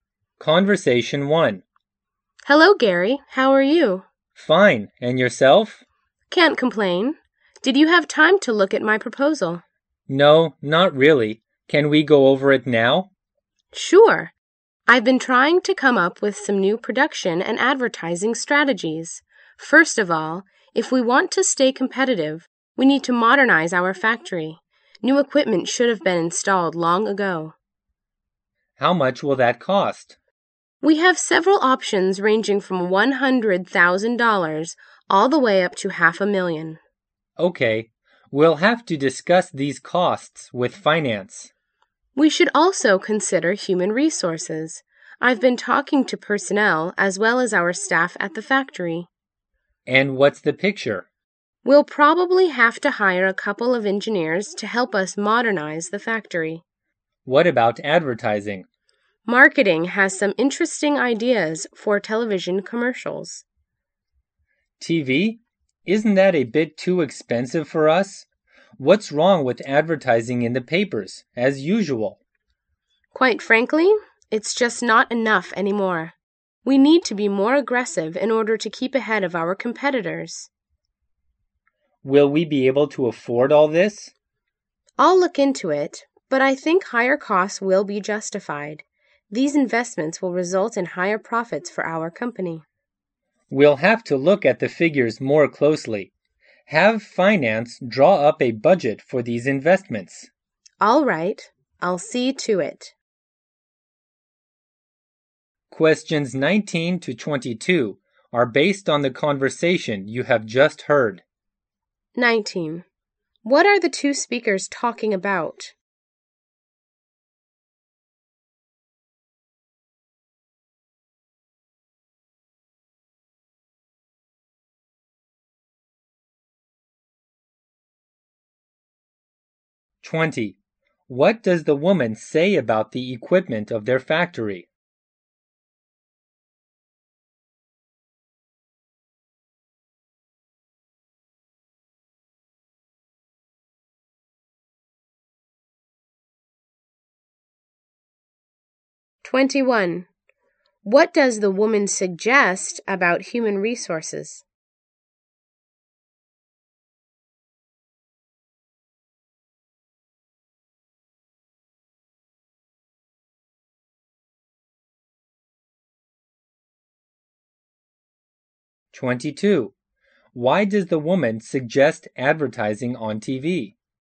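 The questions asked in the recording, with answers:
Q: What are the two speakers talking about?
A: New production and advertising strategies.

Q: What does the woman say about the equipment of their factory?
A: New equipment should have been installed long ago.

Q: What does the woman suggest about human resources?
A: Hiring a couple of engineers.

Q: Why does the woman suggest advertising on TV?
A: To keep ahead of competitors, since newspaper ads are no longer enough.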